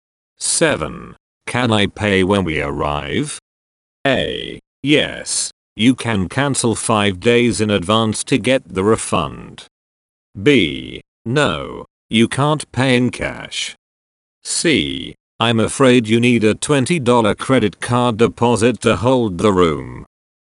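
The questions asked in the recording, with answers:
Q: Can I pay when we arrive?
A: C: I'm afraid you need a $20 credit card deposit to hold the room.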